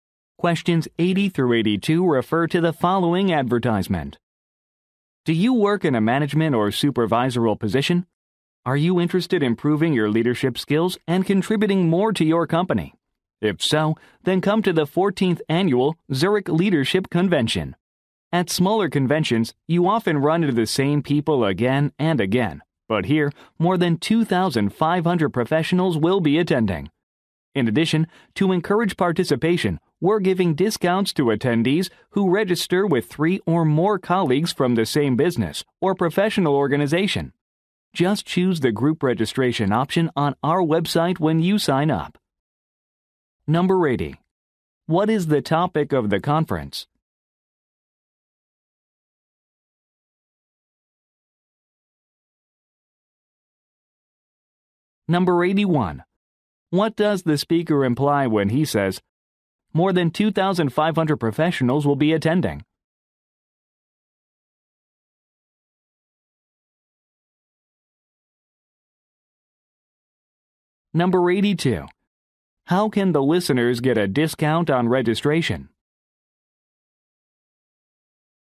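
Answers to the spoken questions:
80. Leadership
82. By registering with three or more colleagues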